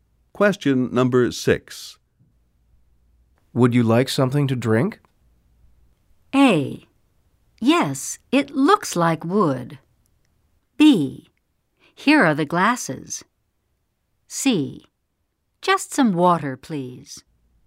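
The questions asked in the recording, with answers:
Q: Would you like something to drink?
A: C: Just some water, please.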